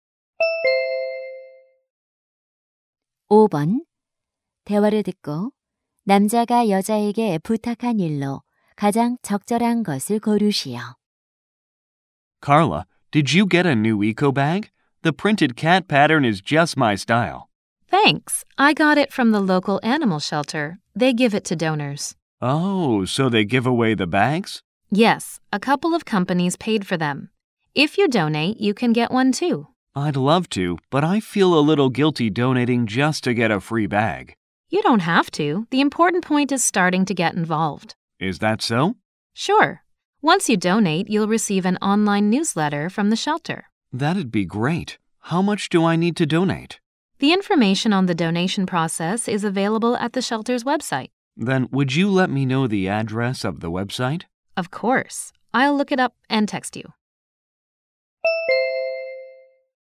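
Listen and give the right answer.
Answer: 동물 보호소 웹사이트 주소 알려 주기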